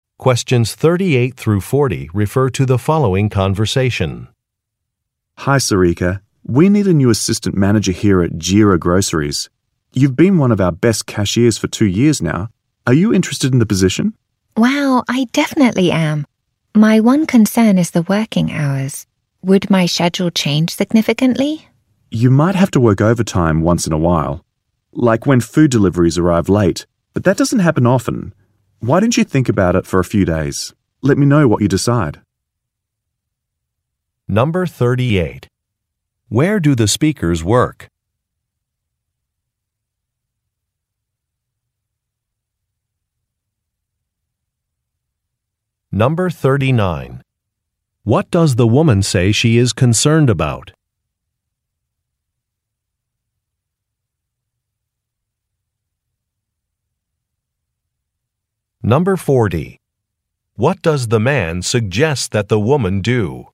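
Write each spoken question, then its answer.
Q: Where do the speakers work?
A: At a grocery store (Jira Groceries)

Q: What does the woman say she is concerned about?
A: The working hours

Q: What does the man suggest that the woman do?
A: Think about the offer for a few days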